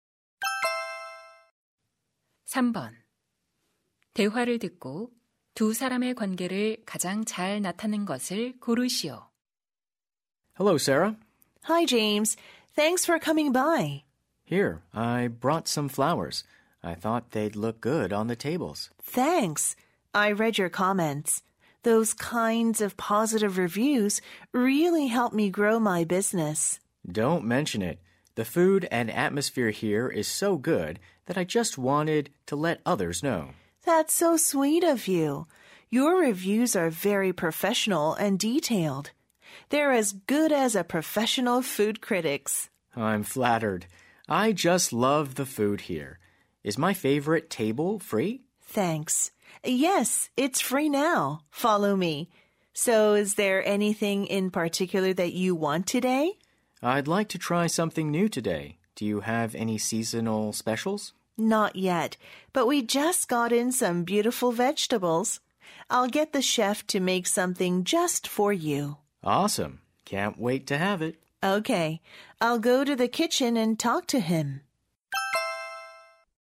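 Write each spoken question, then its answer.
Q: 대화를 듣고 두 사람의 관계를 가장 잘 나타낸 것을 고르시오.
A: 식당 주인 - 음식 리뷰어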